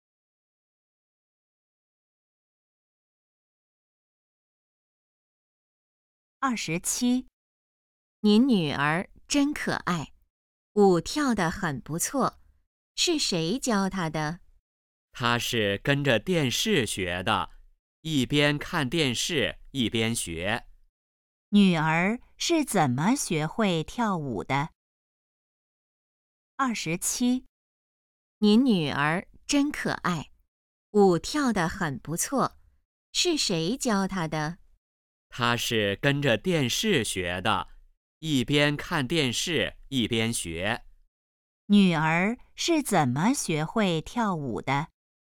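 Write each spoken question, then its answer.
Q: 女儿是怎么学会跳舞的?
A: 跟着电视学的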